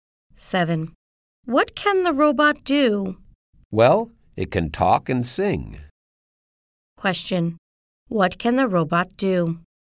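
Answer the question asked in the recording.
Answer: It can talk and sing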